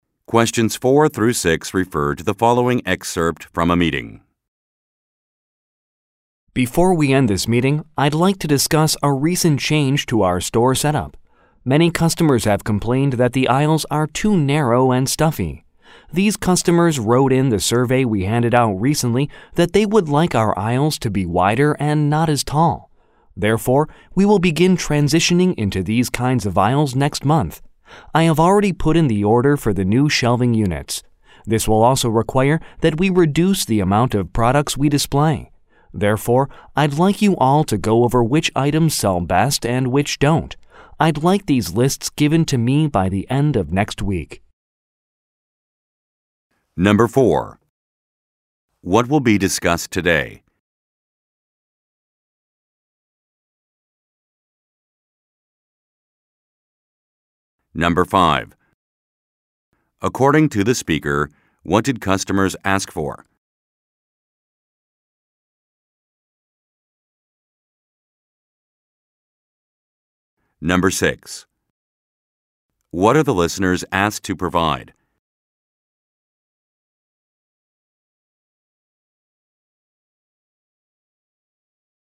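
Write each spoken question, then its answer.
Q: What will be discussed today?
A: A recent change to the store setup

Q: According to the speaker, what did customers ask for?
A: Wider, shorter aisles

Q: What are the listeners asked to provide?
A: Lists of which items sell best and which don't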